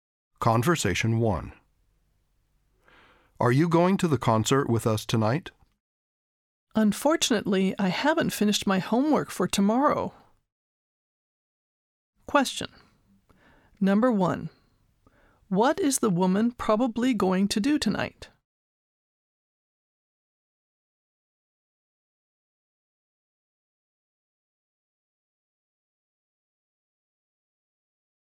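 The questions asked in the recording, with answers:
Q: What is the woman probably going to do tonight?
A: Do her homework (not go to the concert)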